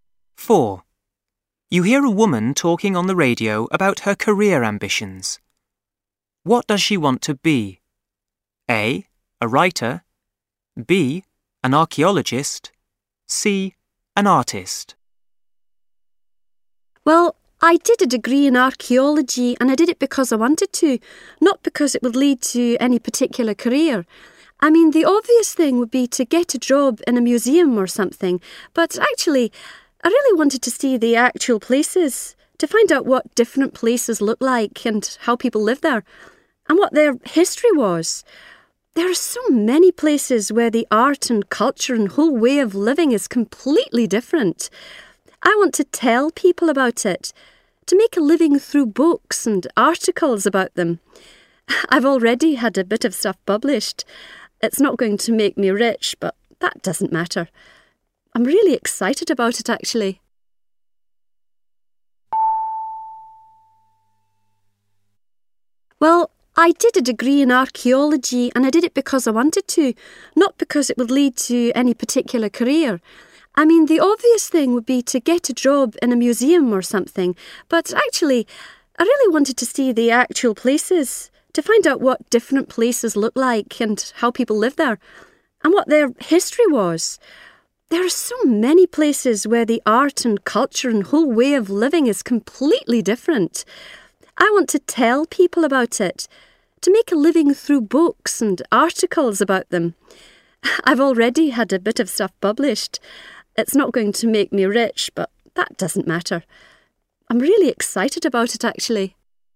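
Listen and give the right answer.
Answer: A: A writer.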